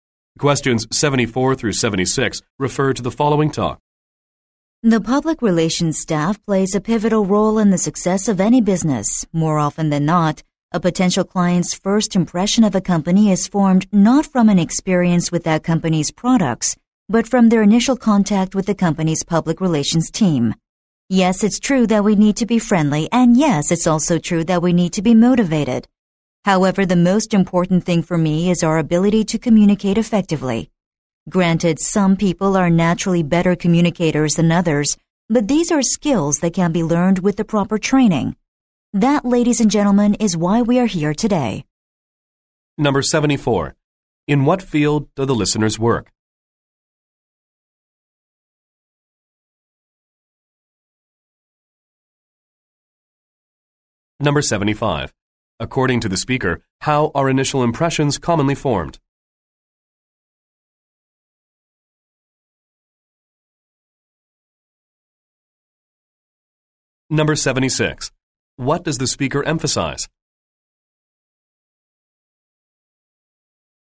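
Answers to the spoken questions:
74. Public relations
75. From initial contact with the public relations team
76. The ability to communicate effectively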